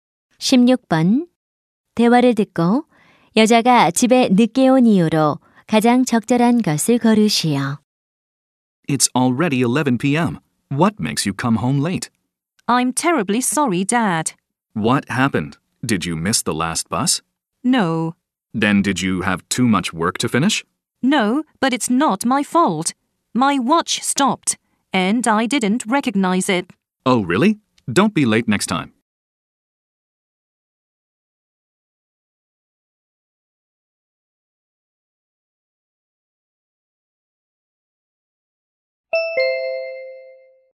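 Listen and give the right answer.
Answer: 시계가 멈춰서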